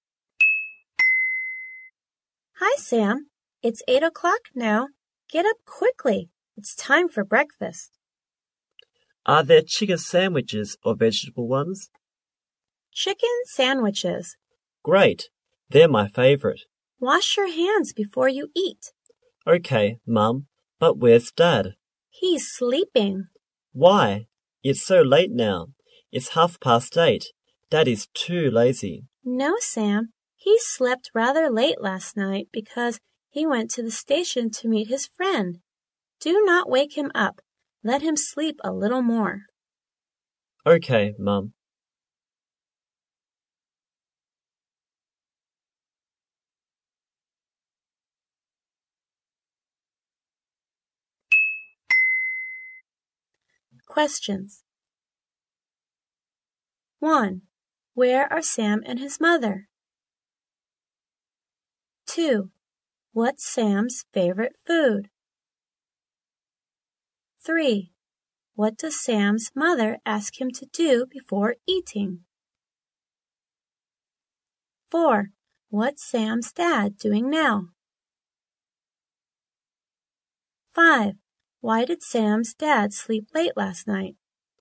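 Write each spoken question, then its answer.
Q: What's Sam's favorite food?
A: Chicken sandwiches

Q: What does Sam's mother ask him to do before eating?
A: Wash his hands

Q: What's Sam's dad doing now?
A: He's sleeping

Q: Why did Sam's dad sleep late last night?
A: He went to the station to meet his friend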